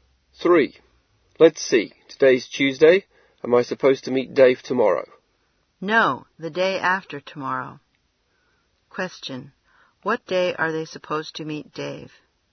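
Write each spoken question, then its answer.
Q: What day are they supposed to meet Dave?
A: Thursday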